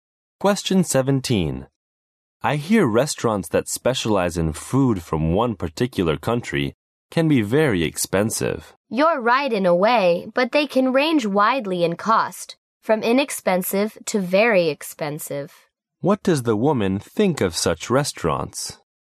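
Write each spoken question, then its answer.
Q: What does the woman think of such restaurants?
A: Their prices vary widely; not all are expensive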